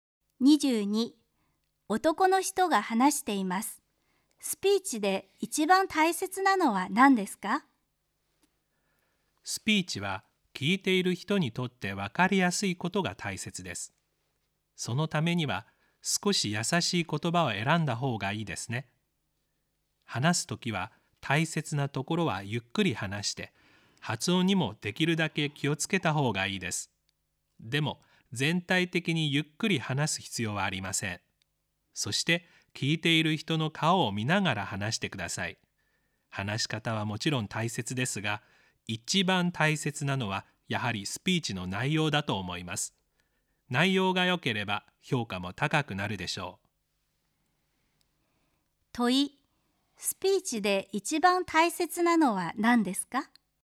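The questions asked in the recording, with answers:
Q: 問い、スピーチで一番大切なのは何ですか。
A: スピーチの内容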